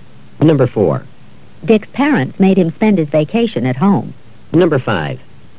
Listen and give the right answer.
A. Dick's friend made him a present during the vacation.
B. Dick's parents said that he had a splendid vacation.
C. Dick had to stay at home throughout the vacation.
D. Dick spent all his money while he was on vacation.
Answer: C. Dick had to stay at home throughout the vacation.

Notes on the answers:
Dick's parents made him spend his vacation at home.

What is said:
It seems as though we've known each other for a long time instead of just two weeks.
4. Dick's parents made him spend his vacation at home.